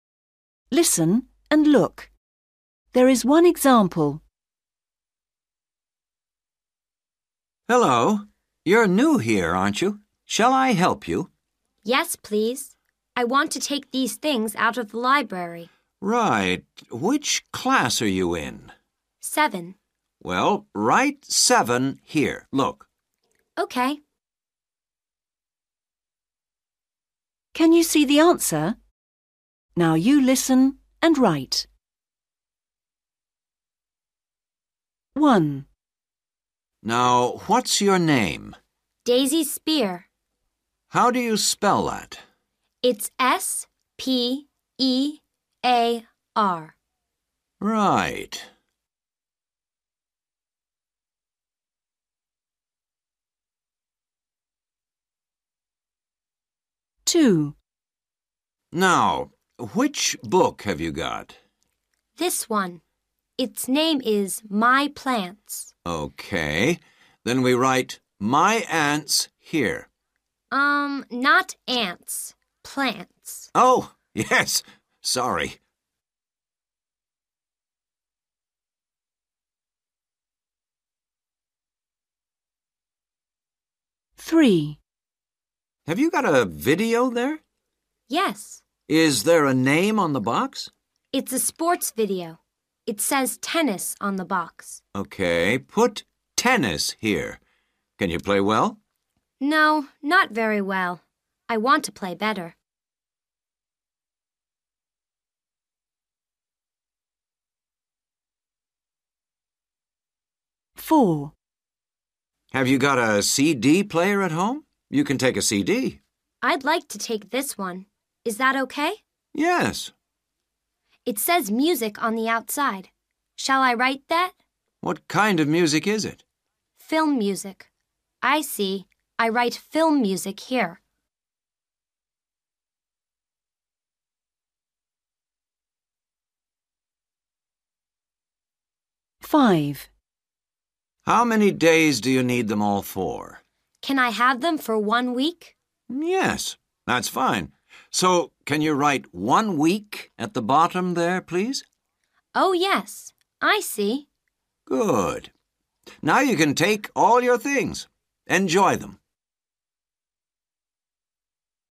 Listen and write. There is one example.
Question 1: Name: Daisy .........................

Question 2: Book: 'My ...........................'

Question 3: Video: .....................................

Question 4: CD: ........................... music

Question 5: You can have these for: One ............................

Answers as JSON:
{"1": "Spear", "2": "Plants", "3": "Tennis", "4": "Film", "5": "week"}

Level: A1